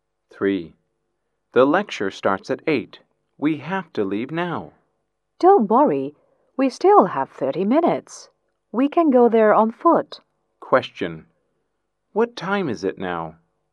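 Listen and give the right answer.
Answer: 7:30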